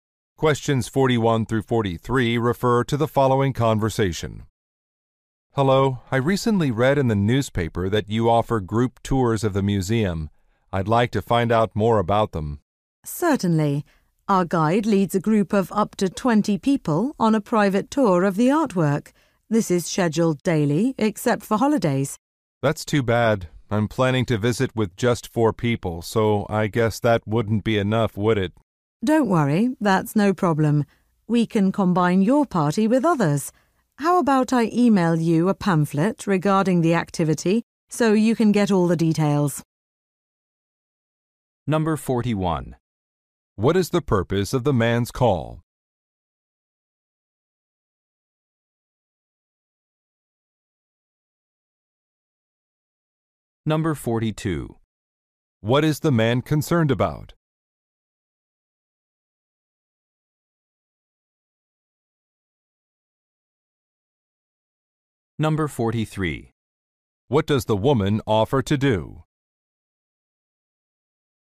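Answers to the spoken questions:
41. To ask about group tours of the museum
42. His group is too small
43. Email a pamphlet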